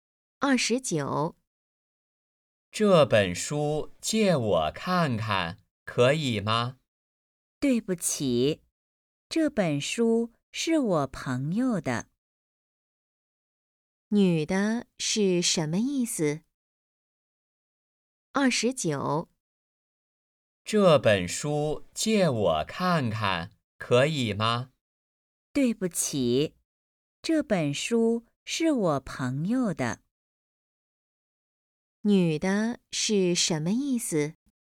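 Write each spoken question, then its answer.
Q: 女的是什么意思?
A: 不能借,书是朋友的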